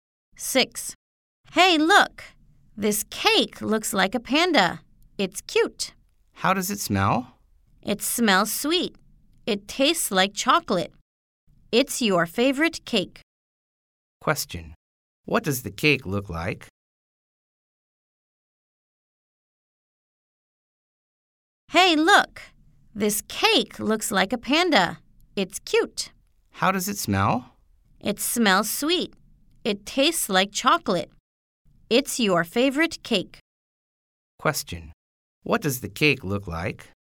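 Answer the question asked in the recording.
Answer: A panda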